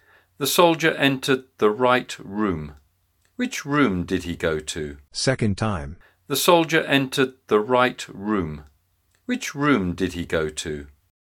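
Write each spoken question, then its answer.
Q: Which room did he go to?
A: The correct room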